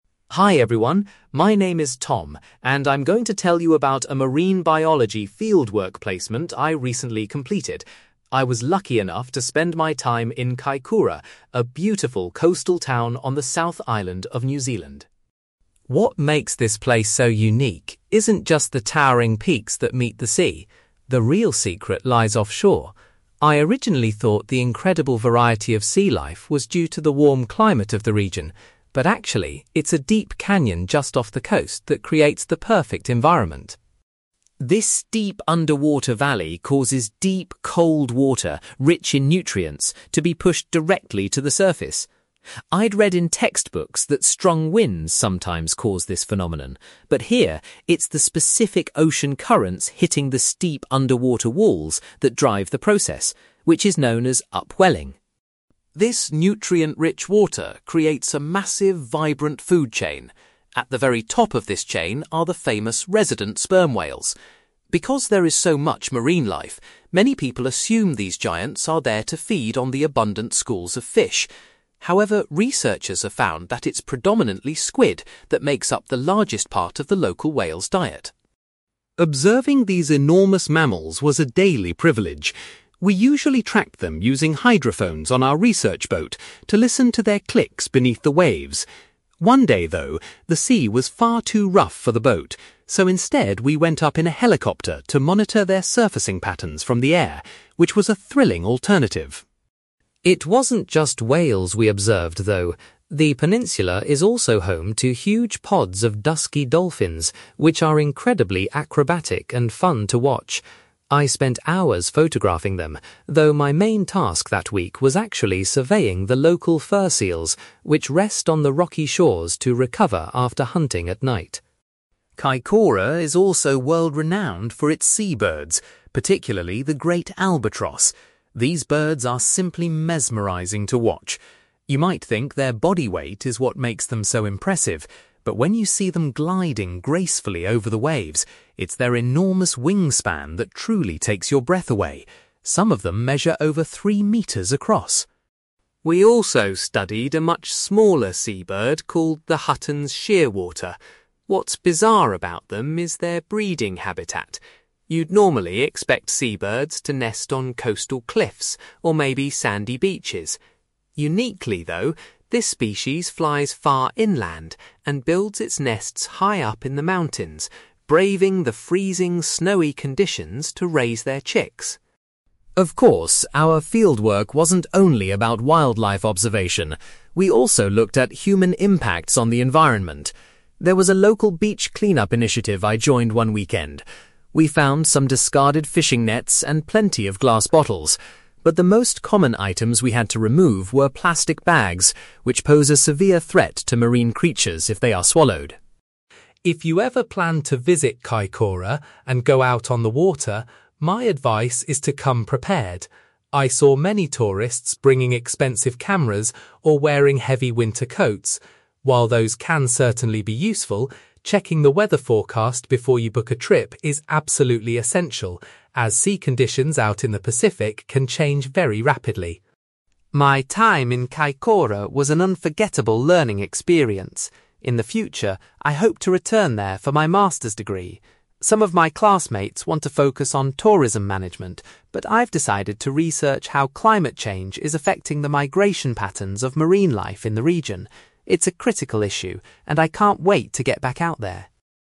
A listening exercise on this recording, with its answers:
You will hear a marine biology student called Tom giving a presentation about his recent fieldwork in Kaikoura, New Zealand. For questions 9-18, complete the sentences with a word or short phrase.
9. Tom learned that the diverse marine life in Kaikoura is primarily supported by a nearby (9)........................... .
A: canyon

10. Tom explains that the mixing of deep and surface water is caused by (10)........................... .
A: ocean currents

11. Tom was surprised to learn that the local sperm whales' diet consists mainly of (11)........................... .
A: squid

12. On one occasion, Tom used a (12)........................... to observe the whales.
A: helicopter

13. During one week of his placement, Tom's main job involved studying the local (13)........................... .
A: fur seals

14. Tom was most impressed by the (14)........................... of the albatrosses he saw.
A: wingspan

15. Tom says that the Hutton's shearwater is unusual because it chooses to build its nests in the (15)........................... .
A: mountains

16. During a beach clean-up, Tom noted that the most frequently found items were (16)........................... .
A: plastic bags

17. Tom advises future visitors to Kaikoura to check the (17)........................... before going out to sea.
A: weather forecast

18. For his master's degree, Tom hopes to research the impact of (18)........................... on marine life migration.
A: climate change

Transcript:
Tom: Hi everyone, my name is Tom, and I'm going to tell you about a marine biology fieldwork placement I recently completed. I was lucky enough to spend my time in Kaikoura, a beautiful coastal town on the South Island of New Zealand.
What makes this place so unique isn't just the towering peaks that meet the sea. The real secret lies offshore. I originally thought the incredible variety of sea life was due to the warm climate of the region, but actually, it's a deep canyon just off the coast that creates the perfect environment.
This steep underwater valley causes deep, cold water rich in nutrients to be pushed directly to the surface. I'd read in textbooks that strong winds sometimes cause this phenomenon, but here, it's the specific ocean currents hitting the steep underwater walls that drive the process, which is known as upwelling.
This nutrient-rich water creates a massive, vibrant food chain. At the very top of this chain are the famous resident sperm whales. Because there is so much marine life, many people assume these giants are there to feed on the abundant schools of fish. However, researchers have found that it's predominantly squid that makes up the largest part of the local whales' diet.
Observing these enormous mammals was a daily privilege. We usually tracked them using hydrophones on our research boat to listen to their clicks beneath the waves. One day, though, the sea was far too rough for the boat, so instead we went up in a helicopter to monitor their surfacing patterns from the air, which was a thrilling alternative!
It wasn't just whales we observed, though. The peninsula is also home to huge pods of dusky dolphins, which are incredibly acrobatic and fun to watch. I spent hours photographing them, though my main task that week was actually surveying the local fur seals, which rest on the rocky shores to recover after hunting at night.
Kaikoura is also world-renowned for its seabirds, particularly the great albatross. These birds are simply mesmerising to watch. You might think their body weight is what makes them so impressive, but when you see them gliding gracefully over the waves, it's their enormous wingspan that truly takes your breath away. Some of them measure over three metres across!
We also studied a much smaller seabird called the Hutton's shearwater. What's bizarre about them is their breeding habitat. You'd normally expect seabirds to nest on coastal cliffs or maybe sandy beaches. Uniquely, though, this species flies far inland and builds its nests high up in the mountains, braving the freezing, snowy conditions to raise their chicks.
Of course, our fieldwork wasn't only about wildlife observation; we also looked at human impacts on the environment. There was a local beach clean-up initiative I joined one weekend. We found some discarded fishing nets and plenty of glass bottles, but the most common items we had to remove were plastic bags, which pose a severe threat to marine creatures if they are swallowed.
If you ever plan to visit Kaikoura and go out on the water, my advice is to come prepared. I saw many tourists bringing expensive cameras or wearing heavy winter coats. While those can certainly be useful, checking the weather forecast before you book a trip is absolutely essential, as sea conditions out in the Pacific can change very rapidly.
My time in Kaikoura was an unforgettable learning experience. In the future, I hope to return there for my master's degree. Some of my classmates want to focus on tourism management, but I've decided to research how climate change is affecting the migration patterns of marine life in the region. It's a critical issue, and I can't wait to get back out there.

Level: B2